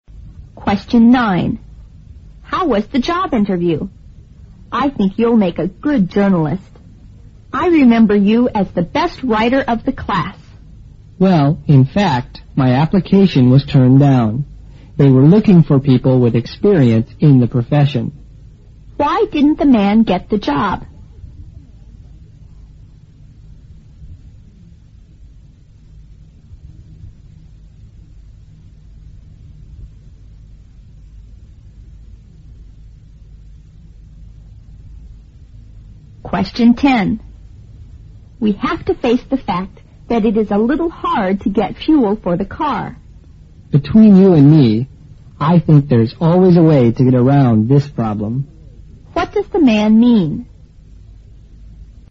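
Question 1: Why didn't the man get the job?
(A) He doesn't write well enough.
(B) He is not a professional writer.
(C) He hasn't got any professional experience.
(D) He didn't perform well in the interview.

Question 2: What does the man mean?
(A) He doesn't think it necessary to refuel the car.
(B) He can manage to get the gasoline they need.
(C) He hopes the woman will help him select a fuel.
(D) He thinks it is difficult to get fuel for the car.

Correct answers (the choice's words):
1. He hasn't got any professional experience.
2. He can manage to get the gasoline they need.

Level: 六级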